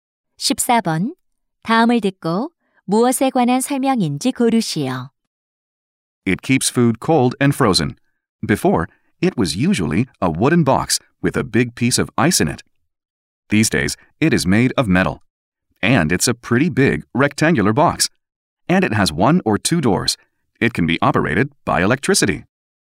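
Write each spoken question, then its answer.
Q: 다음을 듣고 무엇에 관한 설명인지 고르시오.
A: 냉장고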